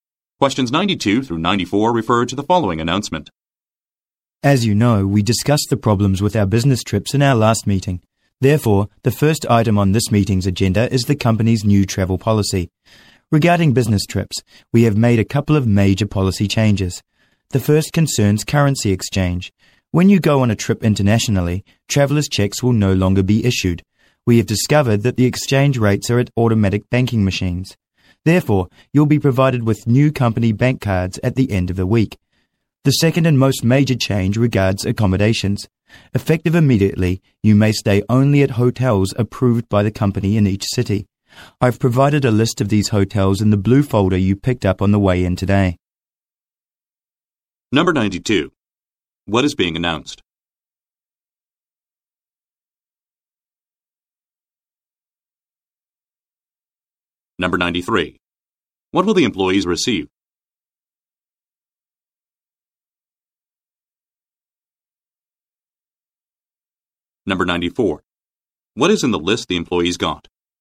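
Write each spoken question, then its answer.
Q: What is being announced?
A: A new company travel policy

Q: What will the employees receive?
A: New company bank cards

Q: What is in the list the employees got?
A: Hotels approved by the company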